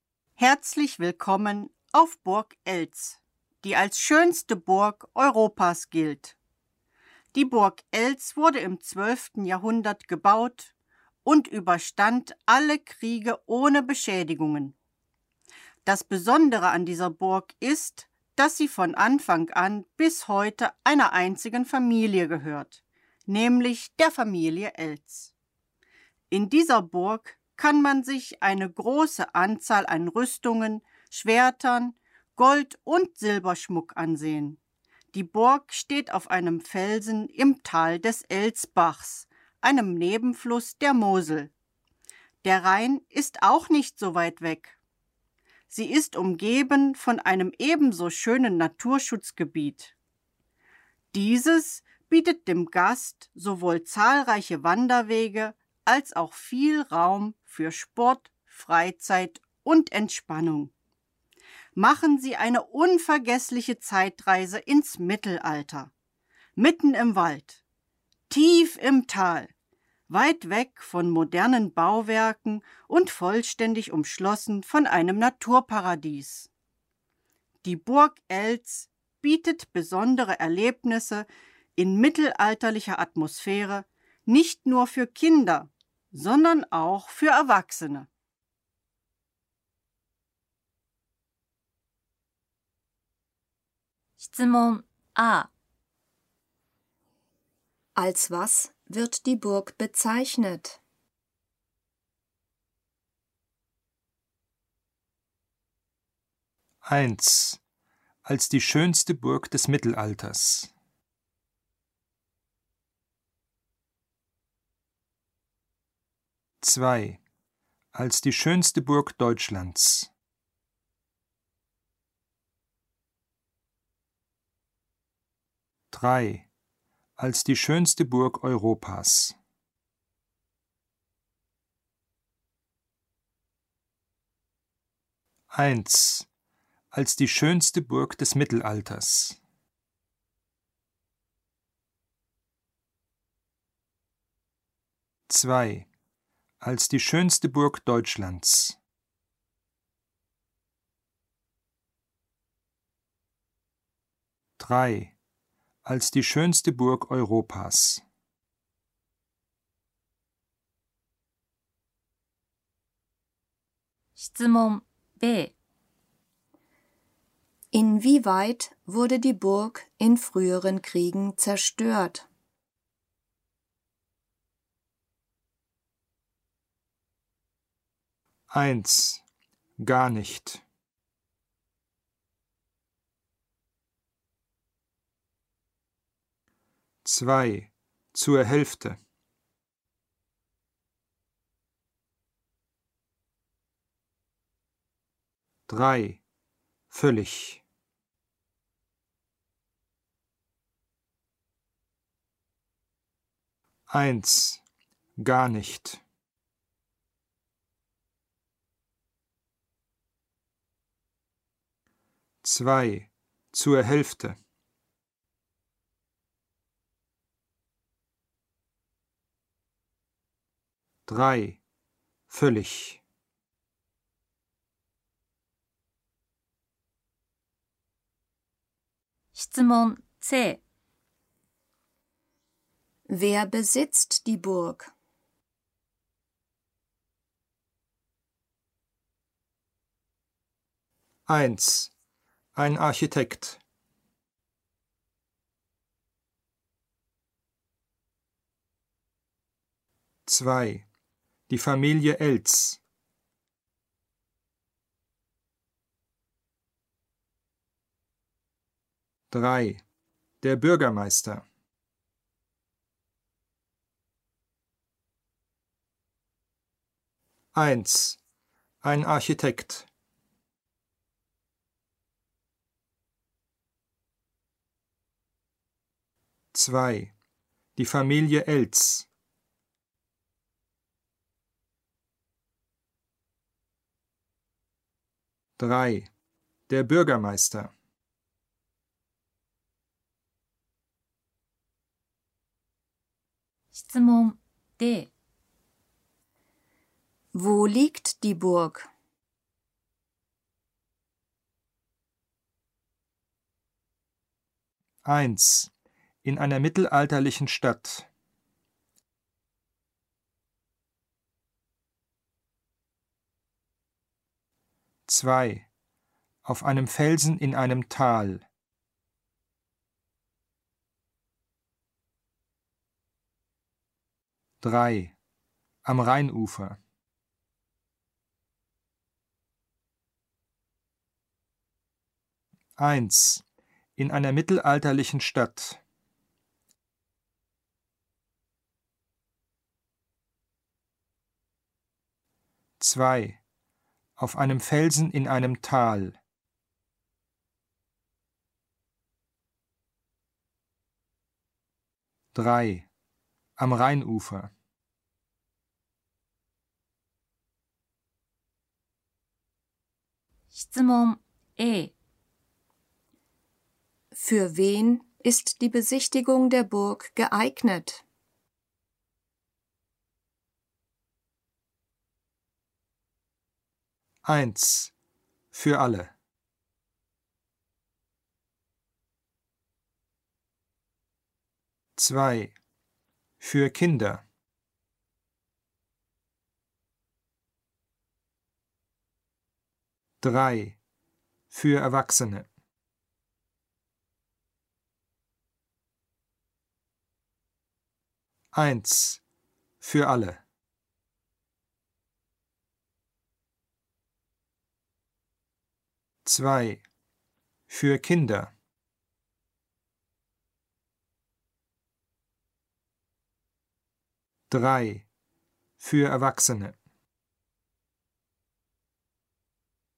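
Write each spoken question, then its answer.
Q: Als was wird die Burg bezeichnet?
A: 3: Als die schönste Burg Europas.

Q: Inwieweit wurde die Burg in früheren Kriegen zerstört?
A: 1: Gar nicht.

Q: Wer besitzt die Burg?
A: 2: Die Familie Elz.

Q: Wo liegt die Burg?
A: 2: Auf einem Felsen in einem Tal.

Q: Für wen ist die Besichtigung der Burg geeignet?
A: 1: Für alle.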